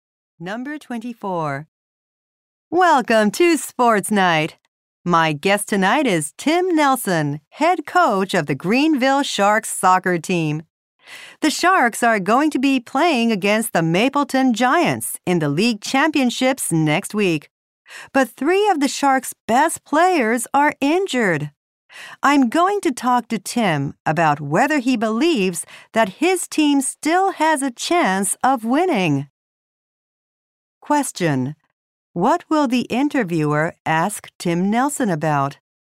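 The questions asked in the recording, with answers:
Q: What will the interviewer ask Tim Nelson about?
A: Whether his team still has a chance of winning.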